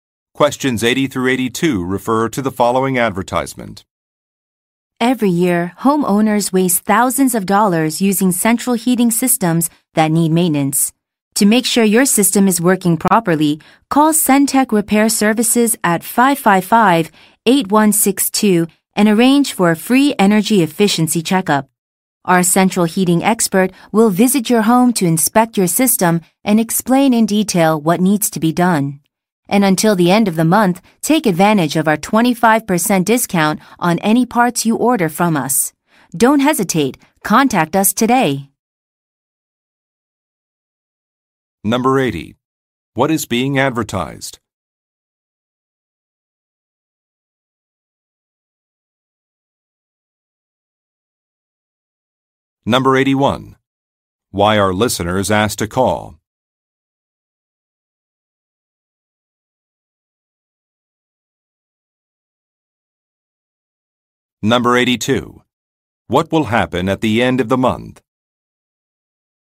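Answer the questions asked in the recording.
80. A central heating repair service
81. To arrange a free energy efficiency checkup
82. The 25% discount on parts will end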